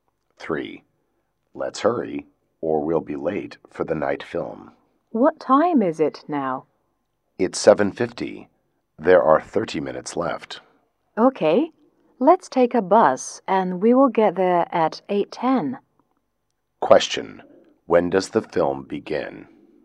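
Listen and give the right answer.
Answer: At 8:20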